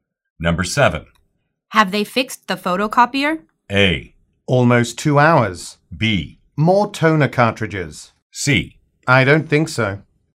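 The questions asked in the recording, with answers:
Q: Have they fixed the photocopier?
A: C: I don't think so.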